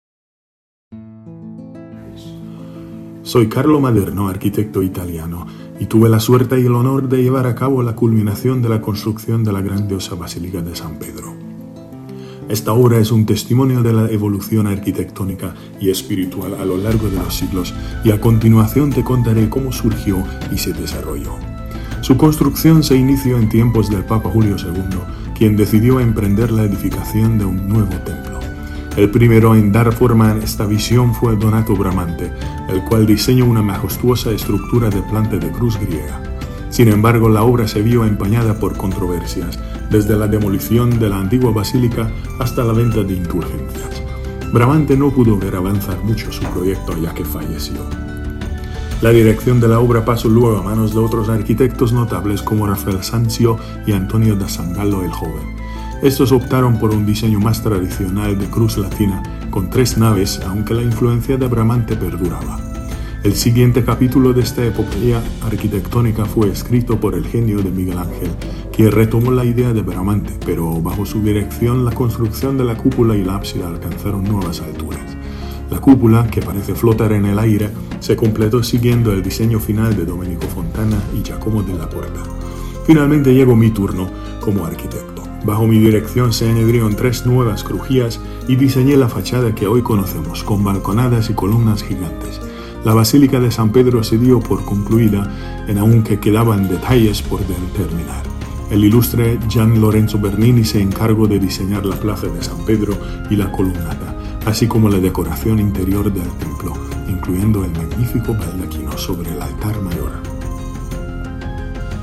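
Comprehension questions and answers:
¿A ver cuánto sabes de la Basílica de San Pedro?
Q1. ¿Cuál fue el arquitecto que diseñó la Basílica de San Pedro en forma de cruz griega inscrita en un cuadrado?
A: Donato Bramante

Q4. ¿Quién diseñó y completó la cúpula de la Basílica de San Pedro?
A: Miguel Ángel la diseñó; la completaron Domenico Fontana y Giacomo della Porta

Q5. ¿Cuál fue la contribución de Carlo Maderno a la Basílica de San Pedro?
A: Añadió tres nuevas crujías y diseñó la fachada con balconadas y columnas gigantes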